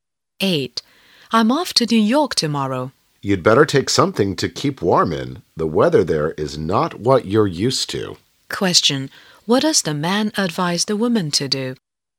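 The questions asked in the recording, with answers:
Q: Question. What does the man advise the woman to do?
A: Take warm clothes with her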